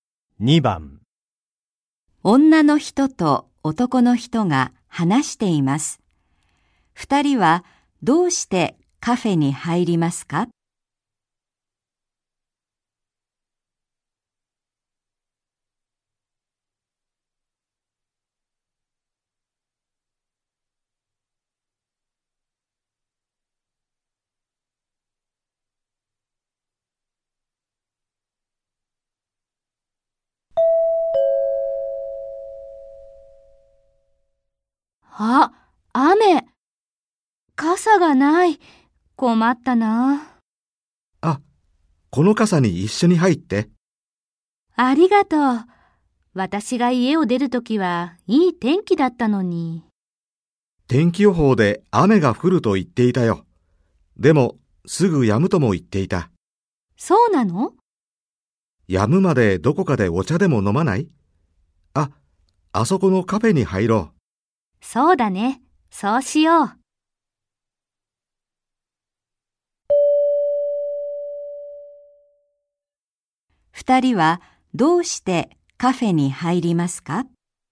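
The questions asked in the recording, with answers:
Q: 二人はどうしてカフェに入りますか?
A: 雨が止むまで待つため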